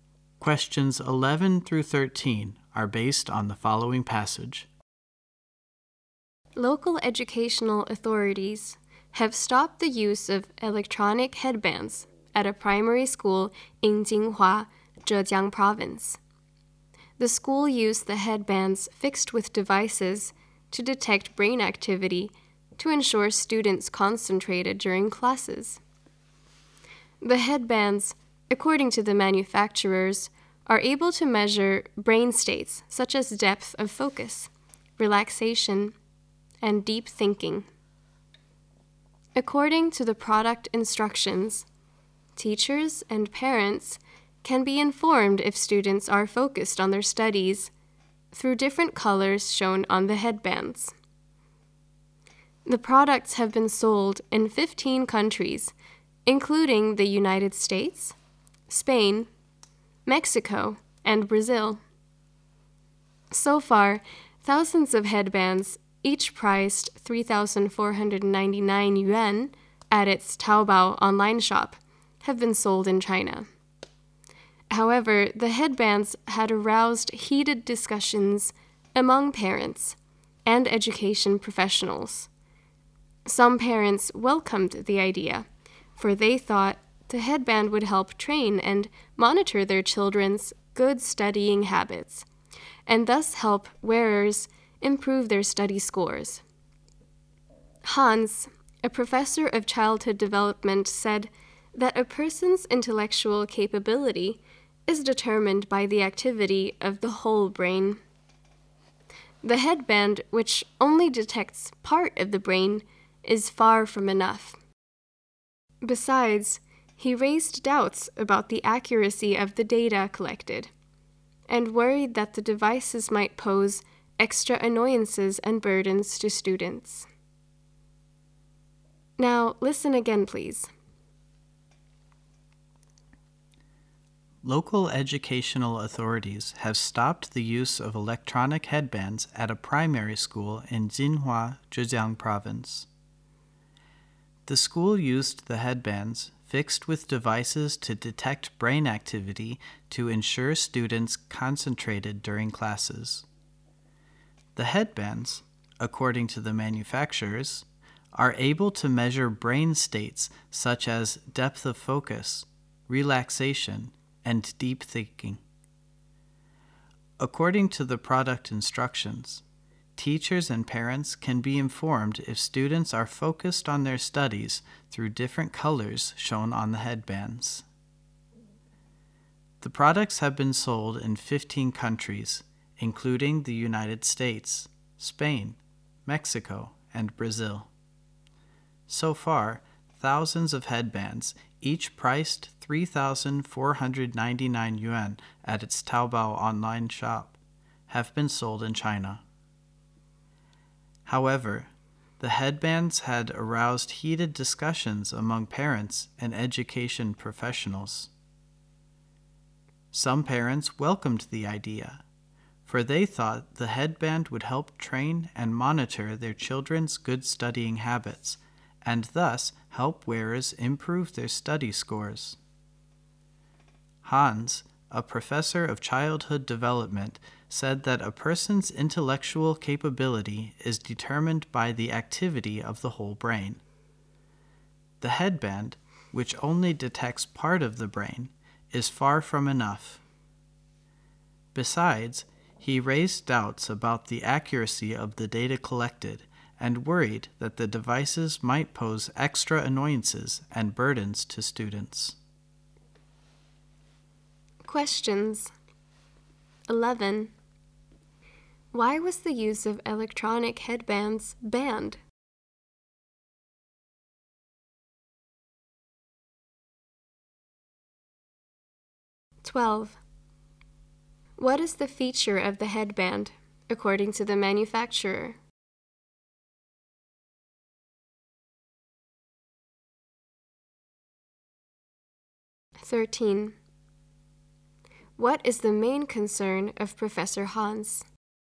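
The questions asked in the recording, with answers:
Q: What is the feature of the headband, according to the manufacturer?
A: It can measure brain states such as focus, relaxation and deep thinking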